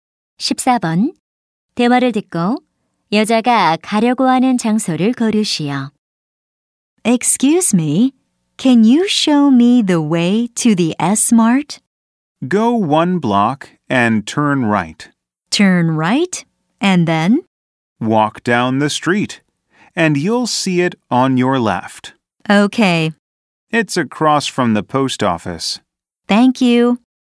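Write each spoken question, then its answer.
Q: 대화를 듣고 여자가 가려고 하는 장소를 고르시오.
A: S-Mart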